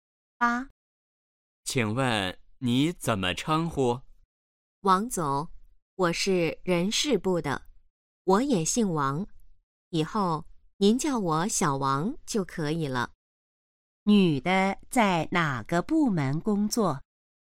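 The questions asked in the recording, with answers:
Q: 女的在哪个部门工作?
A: 人事部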